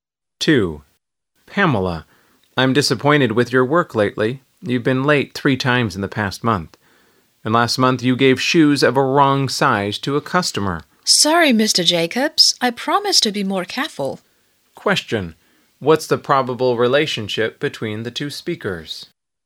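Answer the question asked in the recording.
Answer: Manager and shop assistant (boss and employee)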